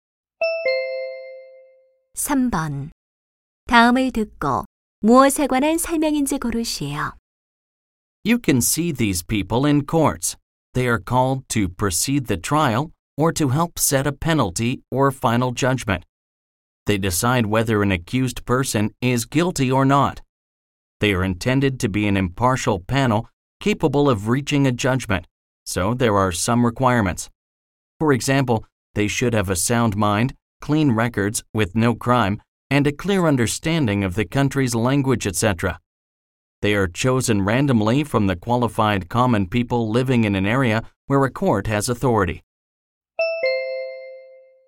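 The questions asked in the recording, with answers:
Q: 다음을 듣고 무엇에 관한 설명인지 고르시오.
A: 배심원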